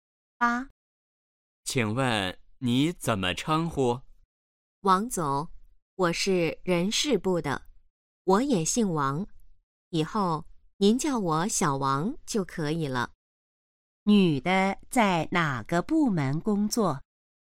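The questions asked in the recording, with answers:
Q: 女的在哪个部门工作?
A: 人事部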